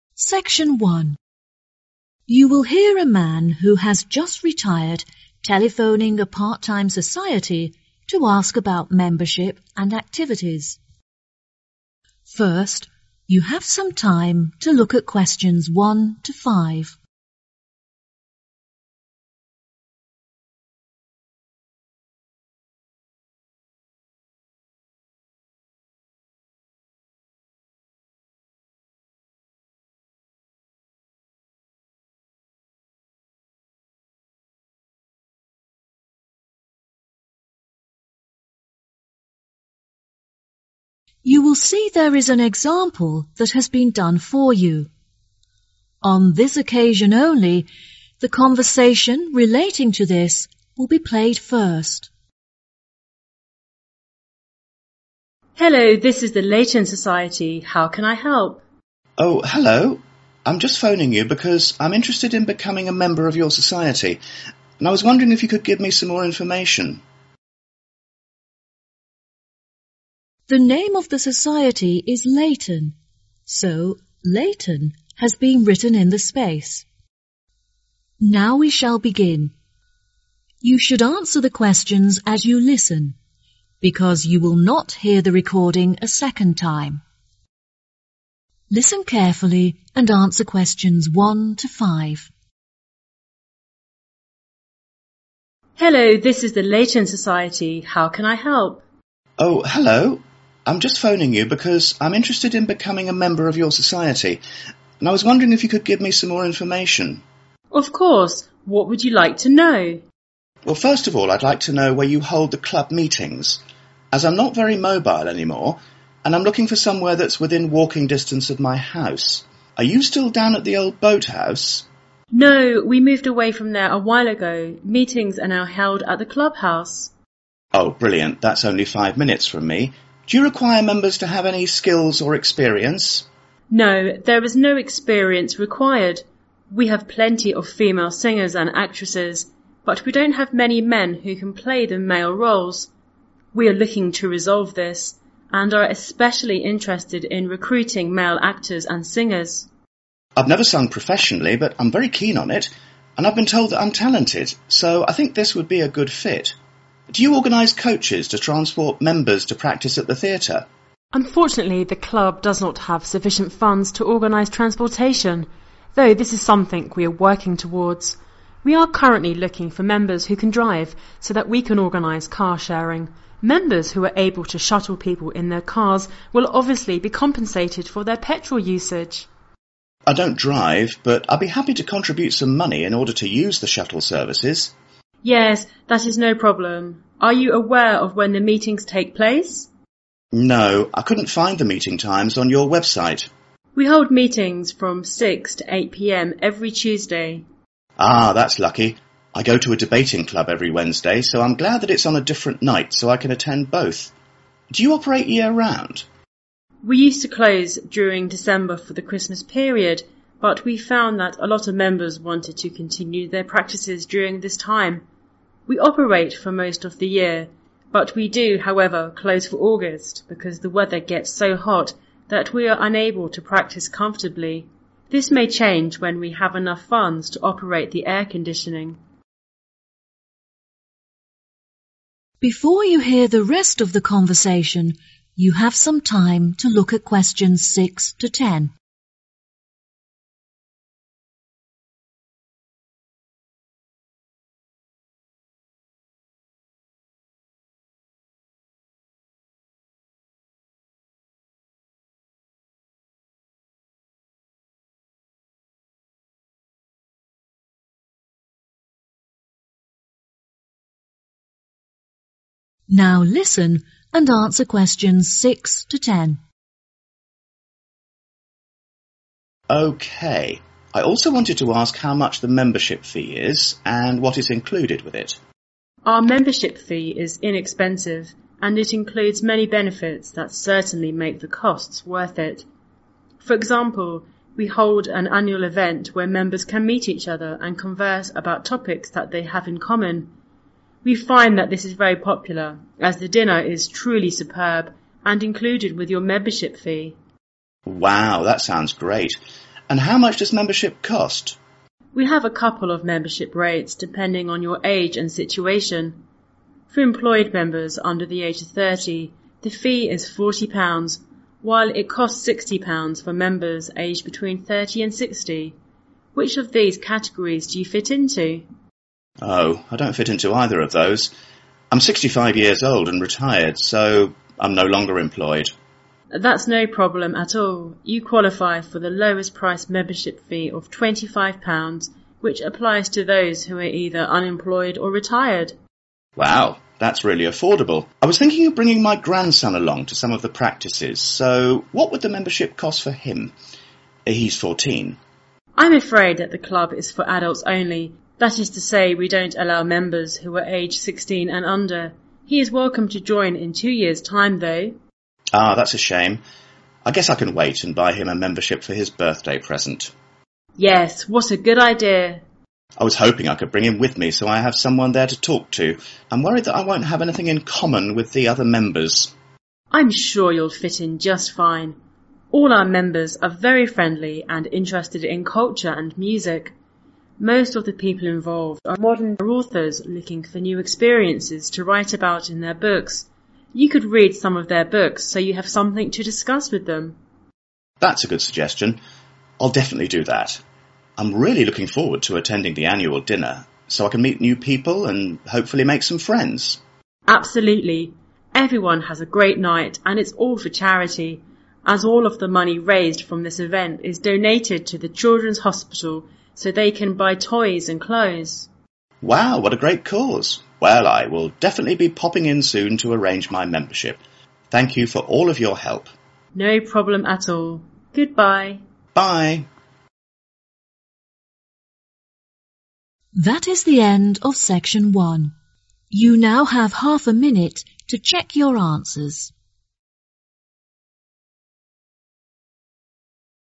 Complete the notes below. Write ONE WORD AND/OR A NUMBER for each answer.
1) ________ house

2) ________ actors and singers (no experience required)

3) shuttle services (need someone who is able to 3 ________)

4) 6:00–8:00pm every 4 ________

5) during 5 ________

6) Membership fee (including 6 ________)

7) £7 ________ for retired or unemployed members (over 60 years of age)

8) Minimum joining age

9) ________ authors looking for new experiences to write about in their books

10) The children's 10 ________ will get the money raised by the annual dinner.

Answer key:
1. club
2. male
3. drive
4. Tuesday
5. August
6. dinner
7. 25
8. 17
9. modern
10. hospital